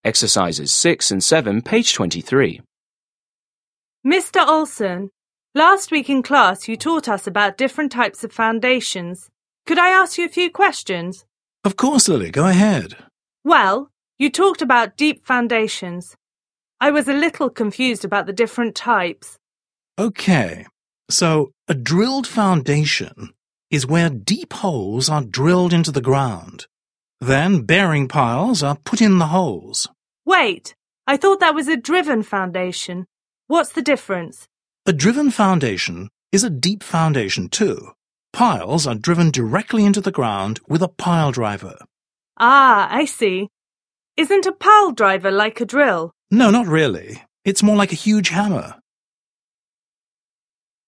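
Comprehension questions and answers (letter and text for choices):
7. Listen again and complete the conversation.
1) Last week in class you taught us about 1_________ _________ of foundations.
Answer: different types

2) Of course, Lily, 2________ ________.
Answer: go ahead

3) I was a 3_________ _________about the different types.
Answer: little confused

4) So a 4_________ __________ is where deep holes are drilled into the ground.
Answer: drilled foundation

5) Then 5_________ _________are put in the holes.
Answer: bearing piles

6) A 6_________ __________ is a deep foundation, too.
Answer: driven foundation

6. Listen to a conversation between a teacher and a student. Choose the correct answers.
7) What does the woman ask the man to do?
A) explain how to use pile drivers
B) compare the size of pile types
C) clarify the purpose of different piles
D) review the types of deep foundations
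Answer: D) review the types of deep foundations

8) What does the man compare to a pile driver?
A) a drill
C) a pipe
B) a hammer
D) a nail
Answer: B) a hammer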